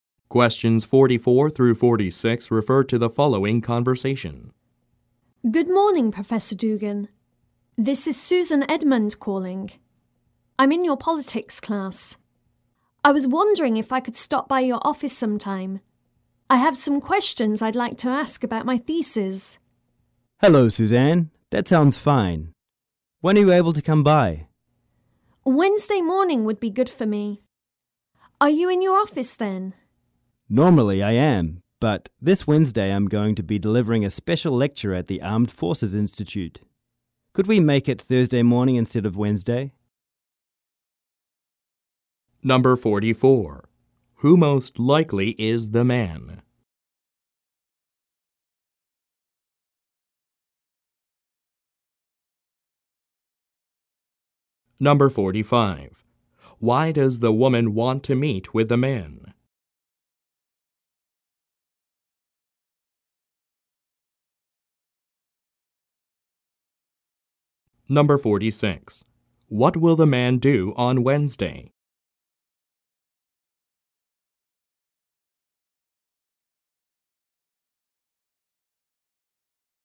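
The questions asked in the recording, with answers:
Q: Who most likely is the man?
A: A professor (of politics)

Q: Why does the woman want to meet with the man?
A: To ask questions about her thesis

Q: What will the man do on Wednesday?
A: Deliver a special lecture at the Armed Forces Institute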